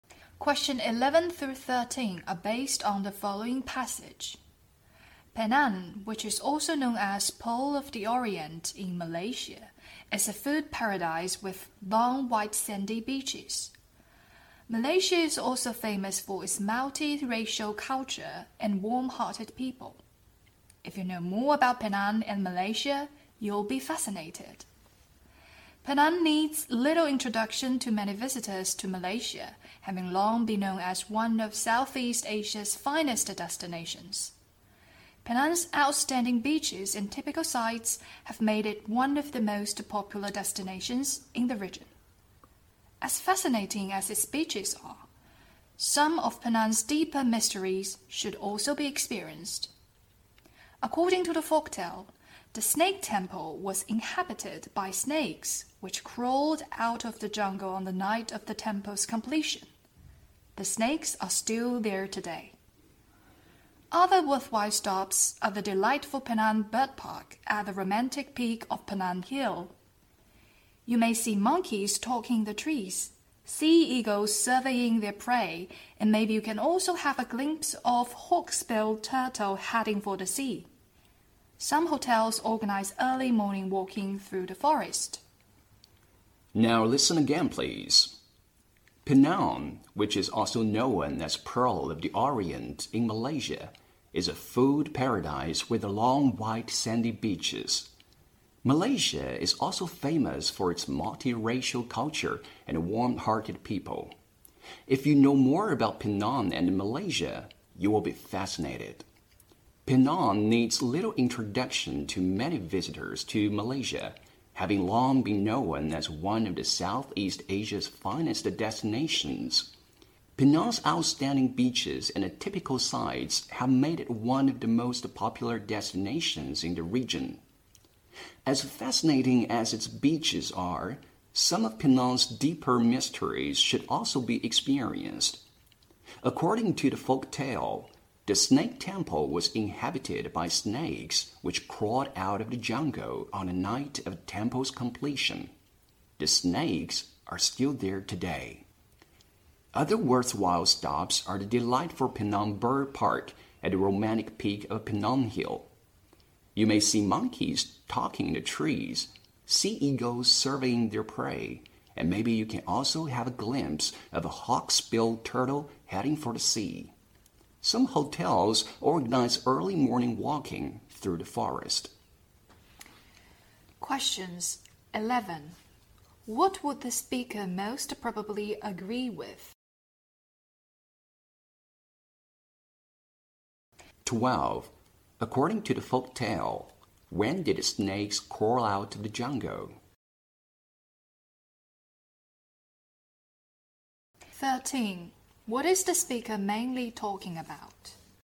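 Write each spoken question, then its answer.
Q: According to the folk tale, when did snakes crawl out of the jungle?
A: On the night the temple was completed

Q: What is the speaker mainly talking about?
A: Penang's tourist attractions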